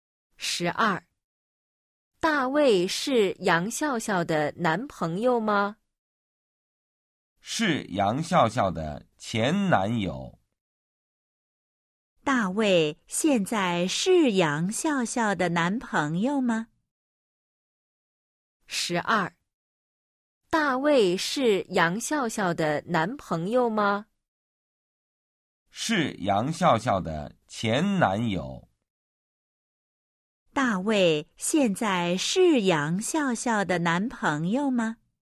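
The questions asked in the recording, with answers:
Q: 大卫现在是杨笑笑的男朋友吗?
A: 不是,是前男友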